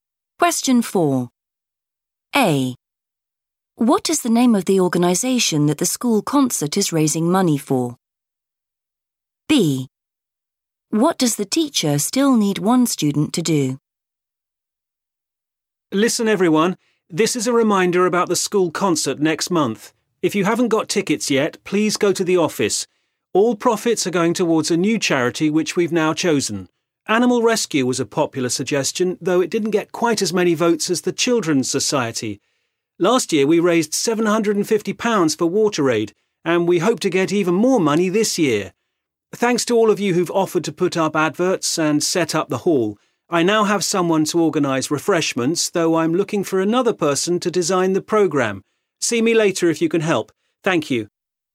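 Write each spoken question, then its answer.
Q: What is the name of the organisation that the school concert is raising money for?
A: the Children's Society

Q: What does the teacher still need one student to do?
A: design the programme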